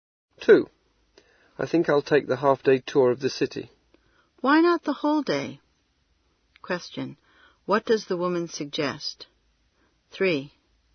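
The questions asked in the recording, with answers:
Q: What does the woman suggest?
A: Taking the whole-day tour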